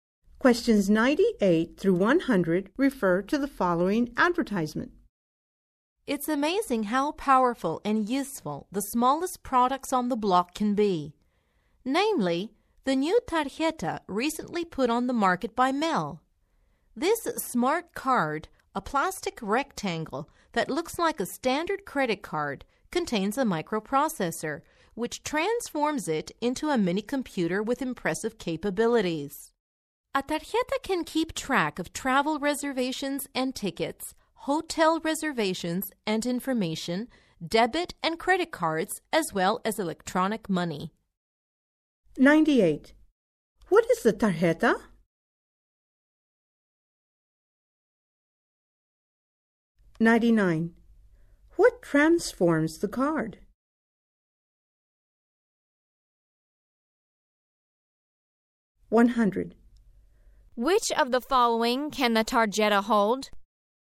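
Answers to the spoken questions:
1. A smart card
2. A microprocessor
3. Travel and hotel reservations, debit and credit cards, electronic money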